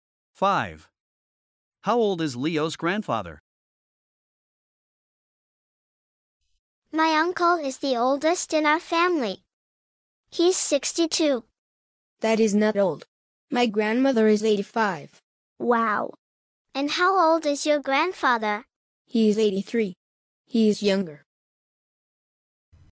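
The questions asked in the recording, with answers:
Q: How old is Leo's grandfather?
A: 83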